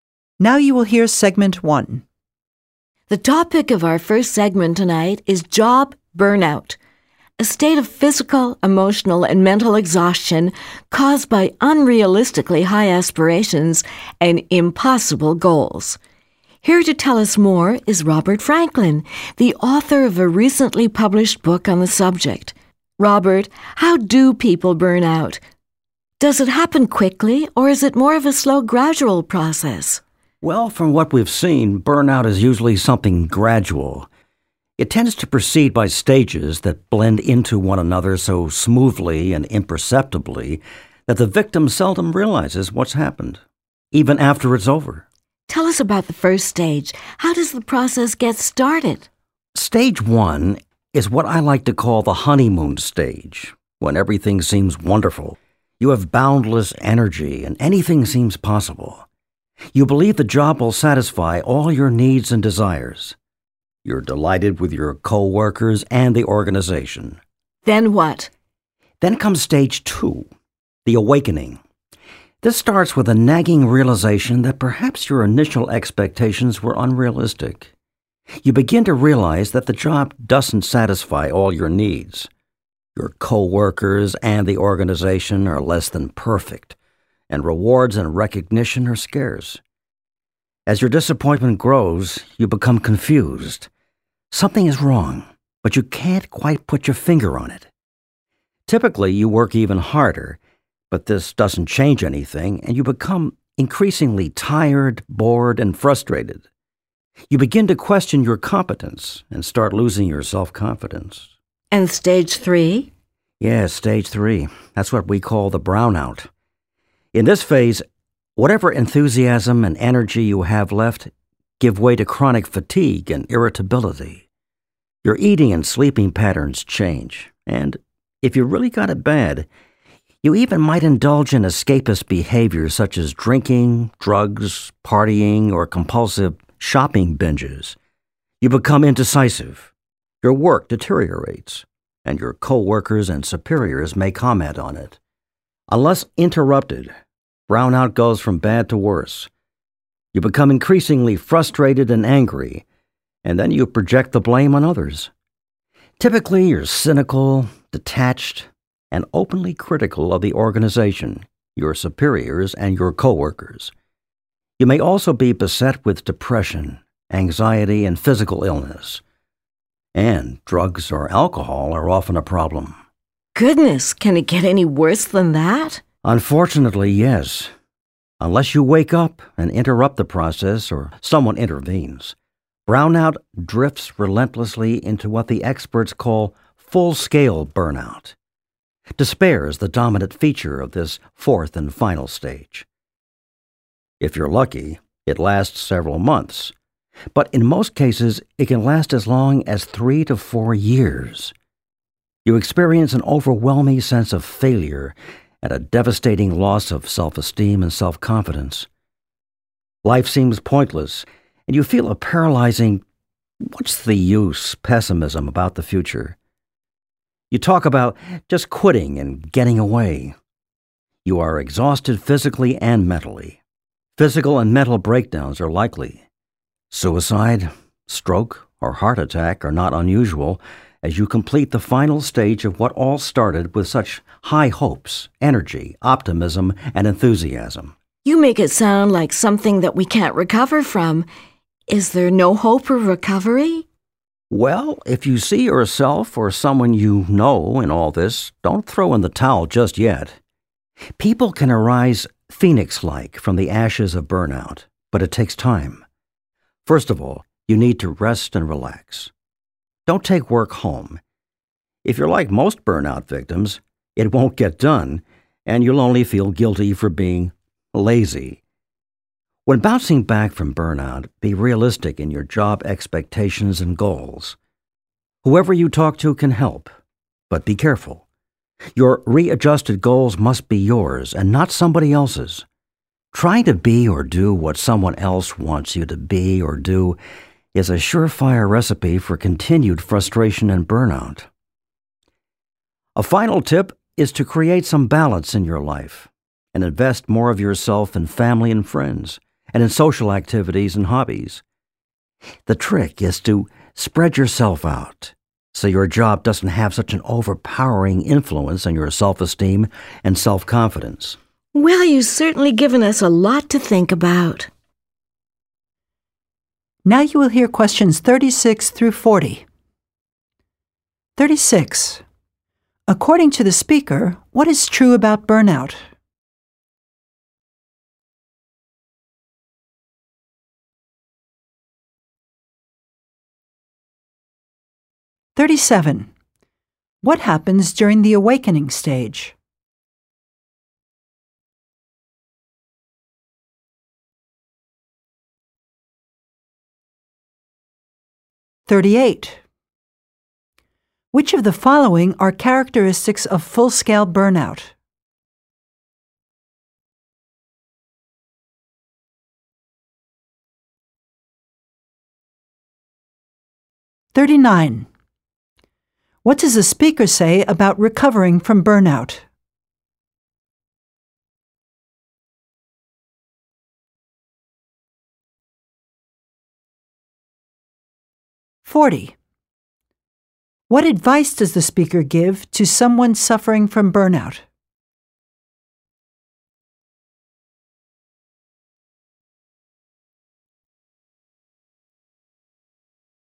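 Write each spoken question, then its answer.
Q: According to the speaker, what is true about burnout?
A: It is usually a gradual process that proceeds by stages

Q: What happens during the awakening stage?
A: You realize your expectations were unrealistic and work harder but become tired, frustrated and lose self-confidence

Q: Which of the following are characteristics of full-scale burnout?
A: Despair, a sense of failure, loss of self-esteem, physical and mental exhaustion

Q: What does the speaker say about recovering from burnout?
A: Recovery is possible but it takes time

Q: What advice does the speaker give to someone suffering from burnout?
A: Rest and relax, set realistic goals of your own, and balance life with family, friends and hobbies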